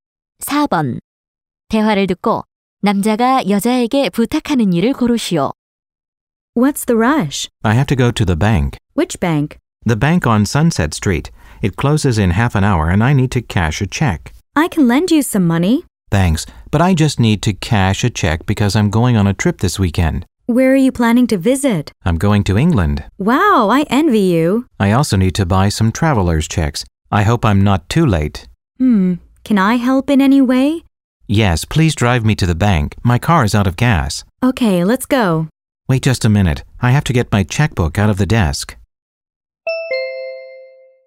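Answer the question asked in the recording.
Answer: 은행까지 차로 태워다 주기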